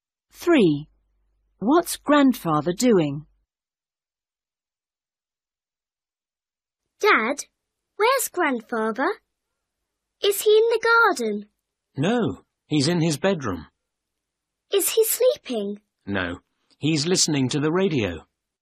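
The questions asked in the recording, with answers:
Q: What's Grandfather doing?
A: Listening to the radio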